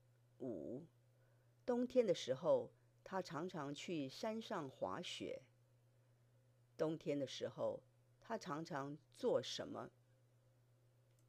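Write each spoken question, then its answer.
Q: 冬天的时候,他常常做什么?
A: 去山上滑雪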